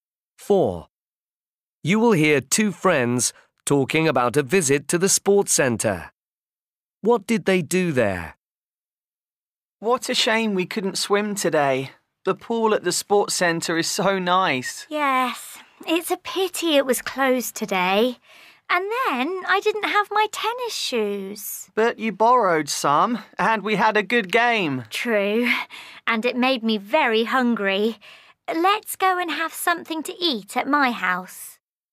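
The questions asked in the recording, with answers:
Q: What did they do there?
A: played tennis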